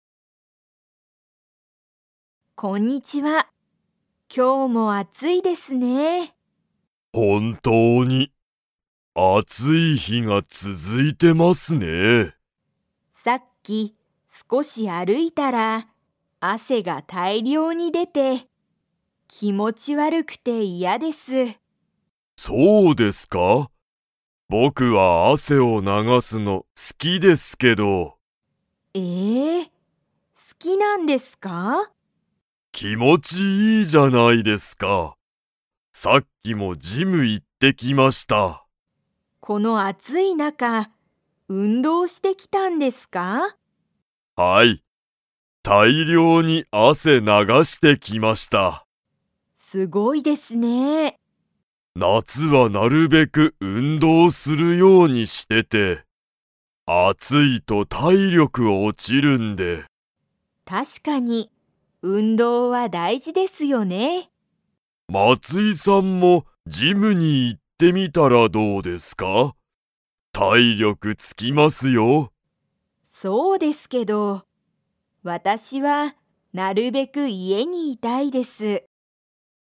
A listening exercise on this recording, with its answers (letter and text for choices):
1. 大西おおにしさんは、汗あせを流ながすのが好すきですか?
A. はい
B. いいえ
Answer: A. はい

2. 大西おおにしさんは、夏なつになるべく するようにしている。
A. 料理りょうり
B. 勉強べんきょう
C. 病気びょうき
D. 運動うんどう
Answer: D. 運動うんどう

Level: Level 4